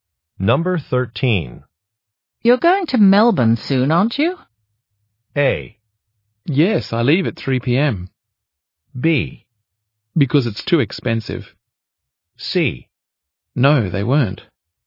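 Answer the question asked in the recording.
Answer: A: Yes, I leave at 3 p.m.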